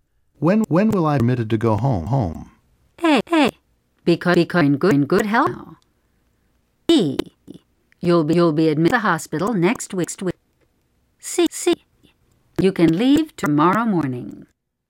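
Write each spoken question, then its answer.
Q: When will I be permitted to go home?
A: C: You can leave tomorrow morning.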